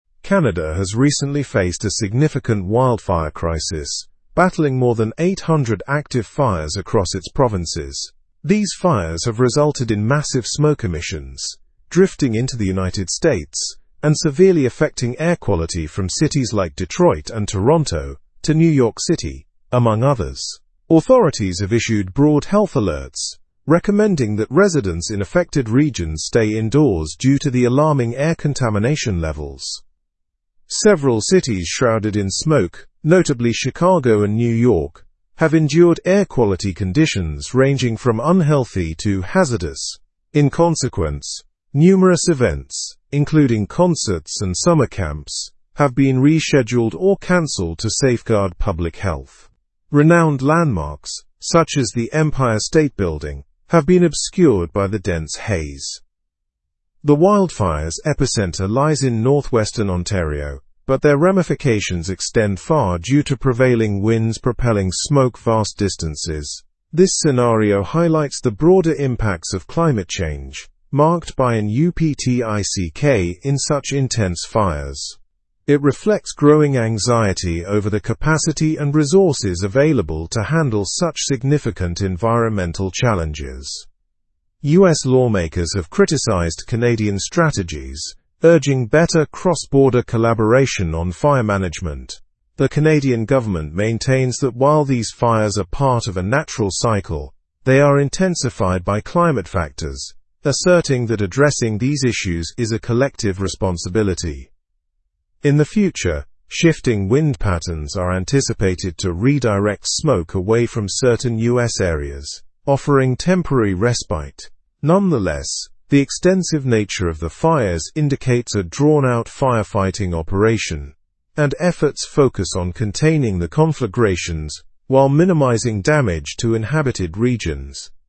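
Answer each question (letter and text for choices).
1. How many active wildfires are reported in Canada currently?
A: Over 800 active wildfires.

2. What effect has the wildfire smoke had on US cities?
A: It has significantly diminished air quality in various US cities.

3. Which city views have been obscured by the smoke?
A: The Empire State Building in New York City has been obscured.

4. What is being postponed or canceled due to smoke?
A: Events such as concerts and children's summer camps have been postponed or canceled.

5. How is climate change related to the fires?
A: Climate change has contributed to the increase and severity of the wildfires.

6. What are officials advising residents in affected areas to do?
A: Officials are advising residents to remain indoors due to poor air quality.

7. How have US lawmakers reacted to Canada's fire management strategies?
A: They have criticized Canadian officials and urged for improved cross-border cooperative measures.

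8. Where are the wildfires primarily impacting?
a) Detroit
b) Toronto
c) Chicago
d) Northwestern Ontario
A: d) Northwestern Ontario

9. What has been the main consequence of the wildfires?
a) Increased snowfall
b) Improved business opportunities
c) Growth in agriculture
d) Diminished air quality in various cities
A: d) Diminished air quality in various cities

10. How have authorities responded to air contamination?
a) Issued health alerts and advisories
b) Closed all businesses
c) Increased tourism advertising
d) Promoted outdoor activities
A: a) Issued health alerts and advisories

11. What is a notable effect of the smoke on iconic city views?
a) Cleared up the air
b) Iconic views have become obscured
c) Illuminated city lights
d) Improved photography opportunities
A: b) Iconic views have become obscured

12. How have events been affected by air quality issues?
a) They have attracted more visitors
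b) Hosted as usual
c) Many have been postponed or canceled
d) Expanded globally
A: c) Many have been postponed or canceled

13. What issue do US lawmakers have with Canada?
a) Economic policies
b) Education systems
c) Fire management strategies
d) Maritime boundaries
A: c) Fire management strategies

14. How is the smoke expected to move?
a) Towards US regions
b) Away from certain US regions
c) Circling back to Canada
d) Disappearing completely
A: b) Away from certain US regions

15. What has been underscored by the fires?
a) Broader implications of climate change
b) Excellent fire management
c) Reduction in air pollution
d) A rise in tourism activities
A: a) Broader implications of climate change

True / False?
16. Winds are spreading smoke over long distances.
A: True

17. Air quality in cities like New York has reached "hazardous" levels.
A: True

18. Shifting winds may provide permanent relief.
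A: False

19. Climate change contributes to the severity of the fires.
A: True

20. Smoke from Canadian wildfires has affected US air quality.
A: True

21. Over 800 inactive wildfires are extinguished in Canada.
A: False

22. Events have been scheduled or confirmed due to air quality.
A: False

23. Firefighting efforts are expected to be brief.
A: False

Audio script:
Canada has recently faced a significant wildfire crisis, battling more than 800 active fires across its provinces. These fires have resulted in massive smoke emissions, drifting into the United States and severely affecting air quality from cities like Detroit and Toronto to New York City, among others. Authorities have issued broad health alerts, recommending that residents in affected regions stay indoors due to the alarming air contamination levels.
Several cities shrouded in smoke, notably Chicago and New York, have endured air quality conditions ranging from "unhealthy" to "hazardous." In consequence, numerous events, including concerts and summer camps, have been rescheduled or canceled to safeguard public health. 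Renowned landmarks, such as the Empire State Building, have been obscured by the dense haze.
The wildfires' epicenter lies in northwestern Ontario, but their ramifications extend far due to prevailing winds propelling smoke vast distances. This scenario highlights the broader impacts of climate change, marked by an uptick in such intense fires. It reflects growing anxiety over the capacity and resources available to handle such significant environmental challenges.
US lawmakers have criticized Canadian strategies, urging better cross-border collaboration on fire management. The Canadian government maintains that while these fires are part of a natural cycle, they are intensified by climate factors, asserting that addressing these issues is a collective responsibility.
In the future, shifting wind patterns are anticipated to redirect smoke away from certain US areas, offering temporary respite. 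Nonetheless, the extensive nature of the fires indicates a drawn-out firefighting operation, and efforts focus on containing the conflagrations while minimizing damage to inhabited regions.

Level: Level 4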